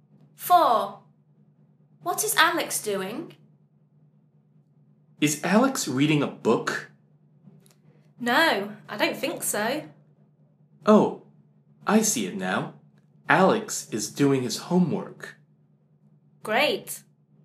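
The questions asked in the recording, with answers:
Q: What is Alex doing?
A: doing his homework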